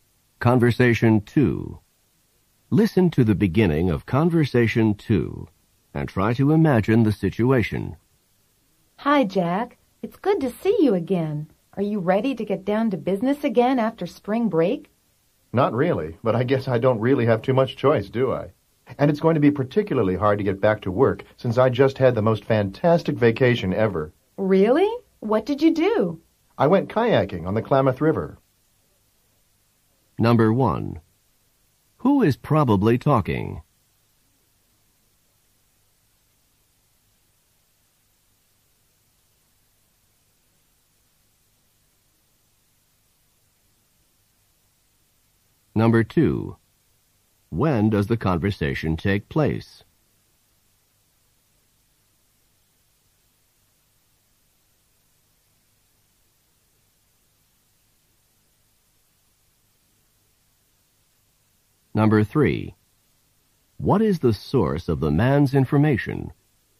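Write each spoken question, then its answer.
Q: When does the conversation take place?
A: After spring break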